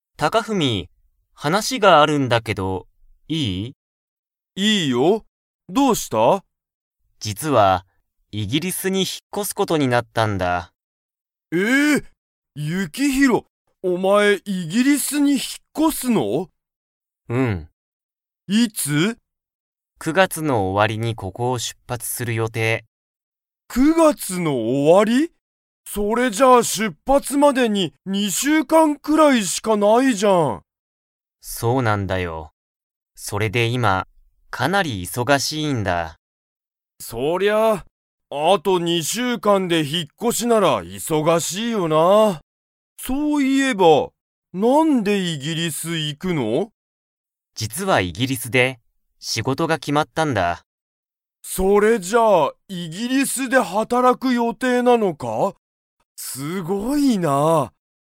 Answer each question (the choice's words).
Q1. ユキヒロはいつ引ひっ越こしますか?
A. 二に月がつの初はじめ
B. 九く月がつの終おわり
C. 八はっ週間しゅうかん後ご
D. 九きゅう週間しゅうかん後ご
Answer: 九く月がつの終おわり

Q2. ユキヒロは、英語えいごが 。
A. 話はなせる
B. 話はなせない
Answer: 話はなせる

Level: Level 4